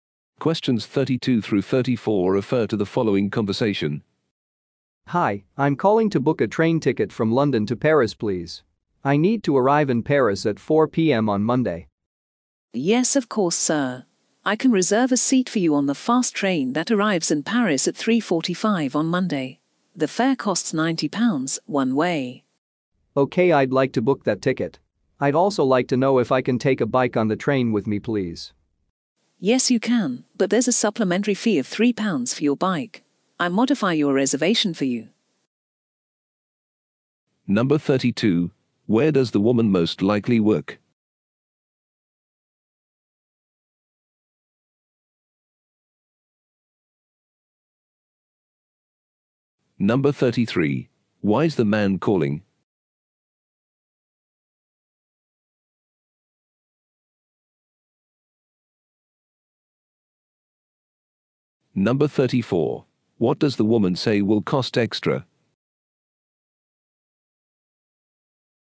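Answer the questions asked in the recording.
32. At a train ticket booking service
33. To book a train ticket from London to Paris
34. Taking a bike on the train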